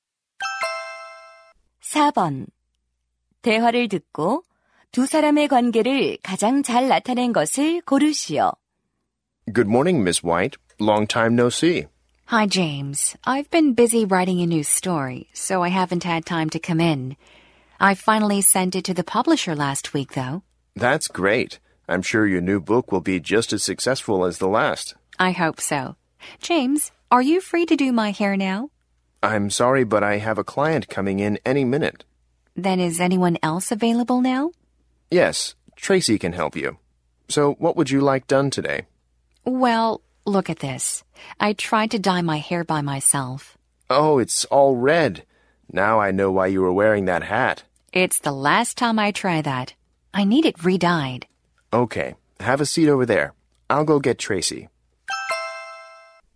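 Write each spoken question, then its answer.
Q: 대화를 듣고 두 사람의 관계를 가장 잘 나타낸 것을 고르시오.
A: 작가 - 미용사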